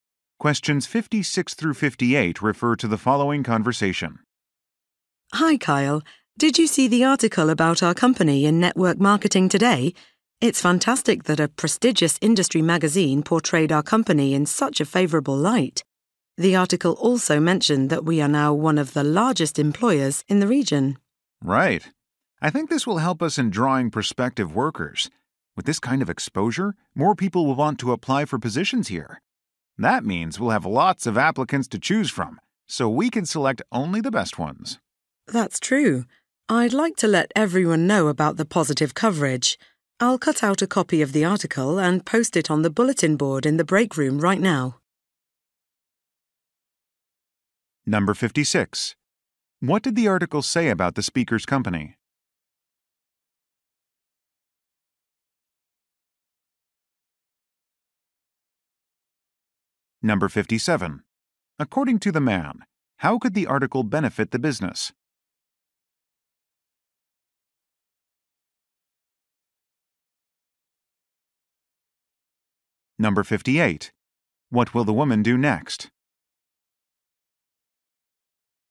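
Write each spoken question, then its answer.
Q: What did the article say about the speaker's company?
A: It is one of the largest employers in the region.

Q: According to the man, how could the article benefit the business?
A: It could attract more job applicants.

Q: What will the woman do next?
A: Post the article on the break room bulletin board.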